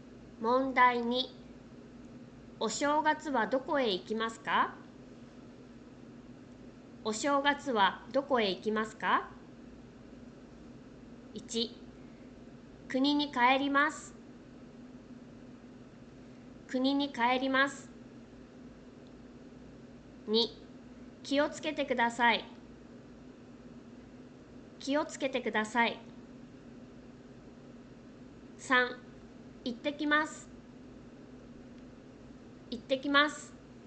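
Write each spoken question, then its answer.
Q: お正月はどこへ行きますか?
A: 1: 国に帰ります。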